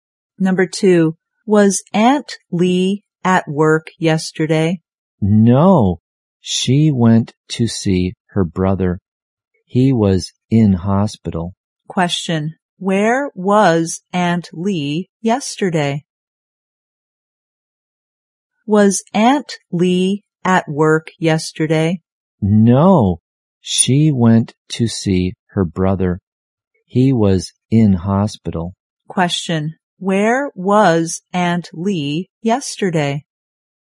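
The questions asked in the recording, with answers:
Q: where was Aunt Lee yesterday?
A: In hospital, visiting her brother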